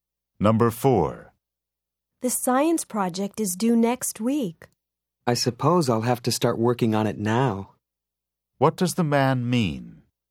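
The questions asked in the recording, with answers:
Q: What does the man mean?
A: He will start the science project now.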